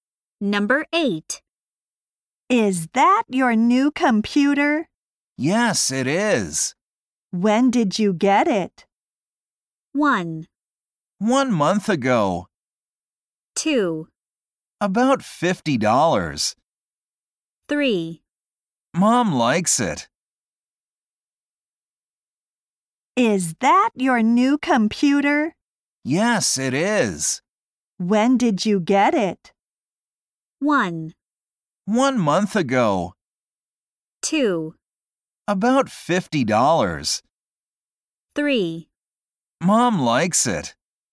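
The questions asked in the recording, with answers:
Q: When did you get it?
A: 1: 1 month ago.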